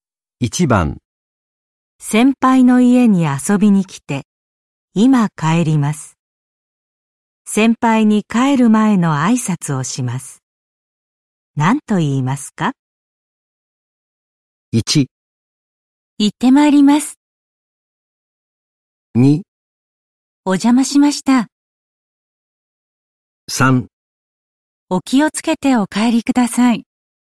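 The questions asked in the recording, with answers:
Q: 何と言いますか?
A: 2: お邪魔しました。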